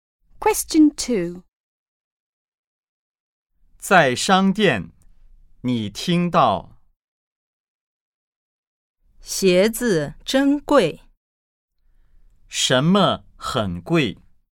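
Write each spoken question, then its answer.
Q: 什么很贵?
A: 鞋子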